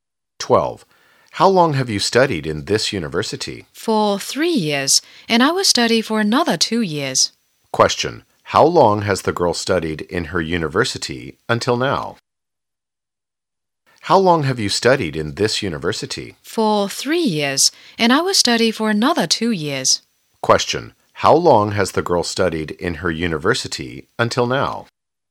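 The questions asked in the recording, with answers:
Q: How long has the girl studied in her university until now?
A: For 3 years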